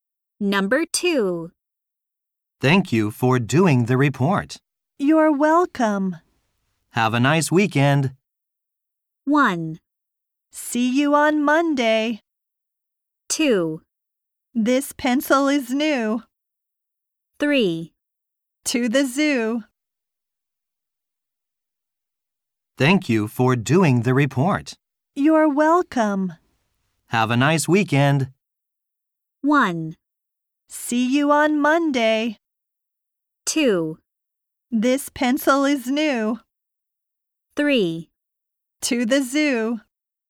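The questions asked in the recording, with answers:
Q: Have a nice weekend.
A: 1: See you on Monday.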